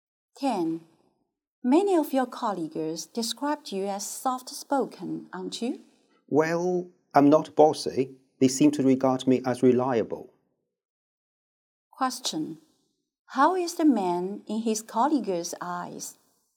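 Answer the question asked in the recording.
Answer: Reliable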